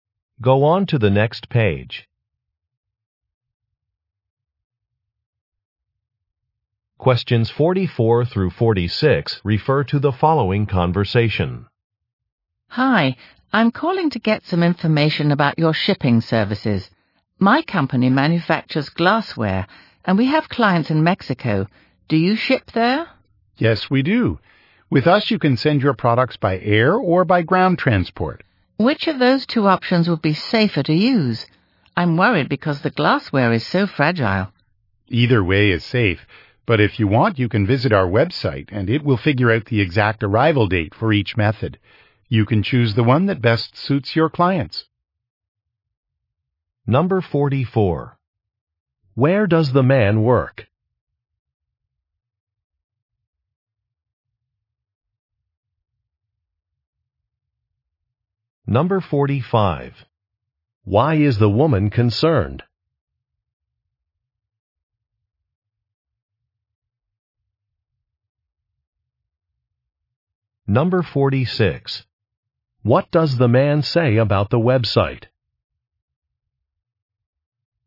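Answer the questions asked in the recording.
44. At a shipping company
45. Her glassware is fragile
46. It calculates the exact arrival date for each shipping method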